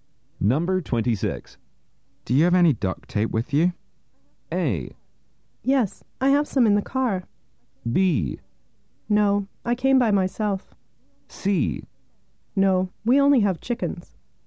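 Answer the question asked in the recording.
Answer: A: Yes, I have some in the car.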